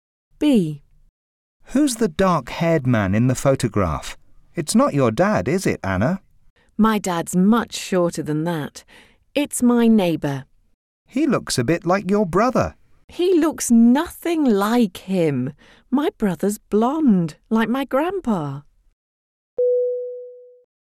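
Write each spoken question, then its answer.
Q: Who's the dark-haired man in the photograph?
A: Anna's neighbour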